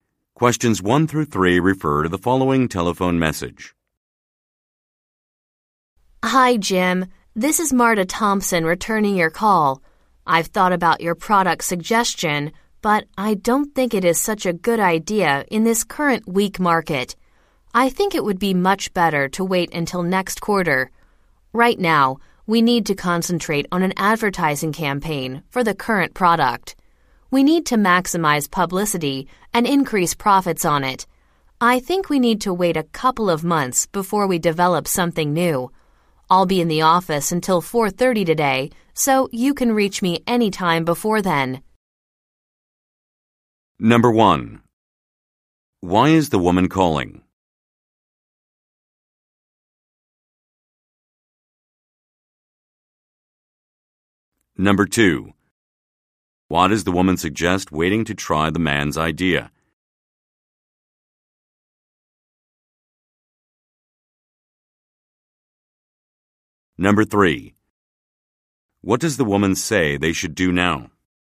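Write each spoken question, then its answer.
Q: Why is the woman calling?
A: To return Jim's call about his product suggestion

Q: Why does the woman suggest waiting to try the man's idea?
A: The current market is weak

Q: What does the woman say they should do now?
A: Concentrate on an advertising campaign for the current product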